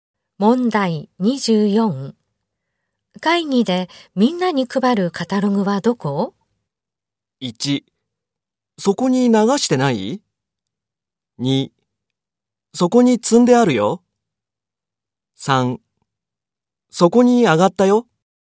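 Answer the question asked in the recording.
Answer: 2: そこに積んであるよ。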